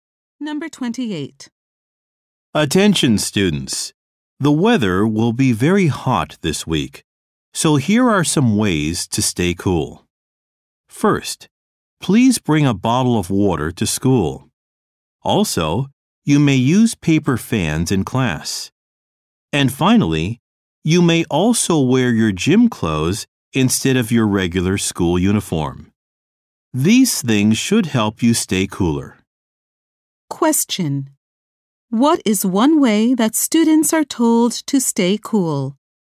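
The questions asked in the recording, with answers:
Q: What is one way that students are told to stay cool?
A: Bring a bottle of water to school.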